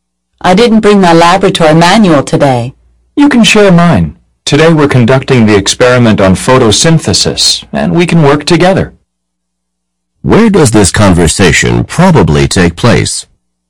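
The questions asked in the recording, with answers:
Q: Where does this conversation probably take place?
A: In a laboratory (science lab)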